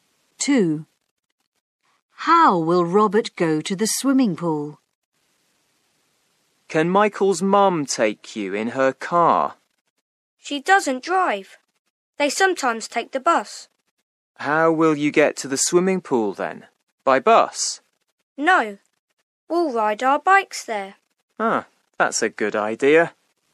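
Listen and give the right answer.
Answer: By bike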